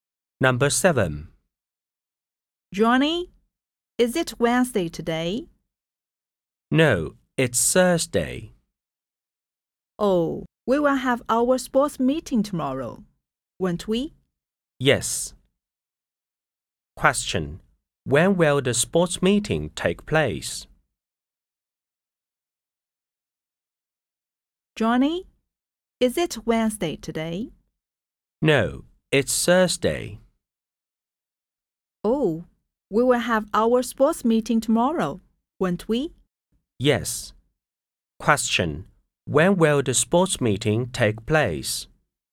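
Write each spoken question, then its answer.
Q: When will the sports meeting take place?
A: On Friday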